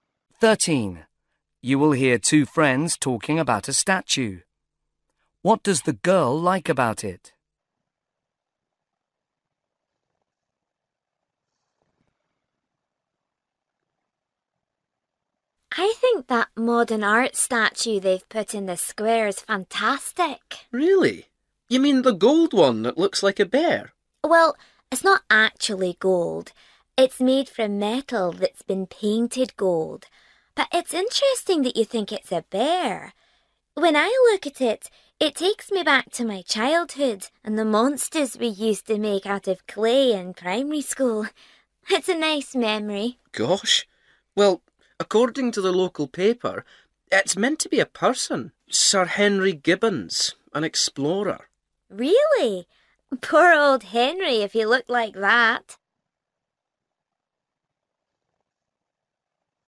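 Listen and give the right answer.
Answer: It reminds her of her childhood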